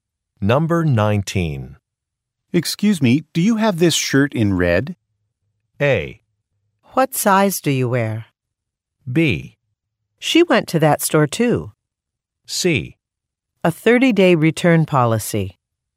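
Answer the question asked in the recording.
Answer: A: What size do you wear?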